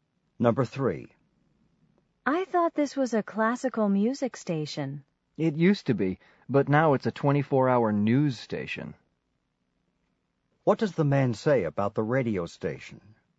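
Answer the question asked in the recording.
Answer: It used to be classical but is now a 24-hour news station.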